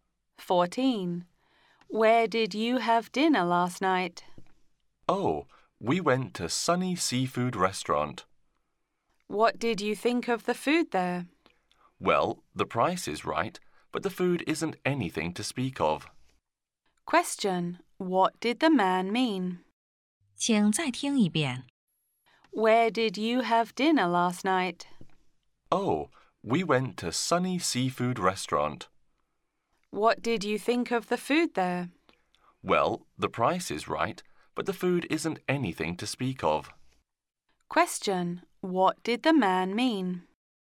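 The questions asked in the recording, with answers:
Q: What did the man mean?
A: The food was cheap but not good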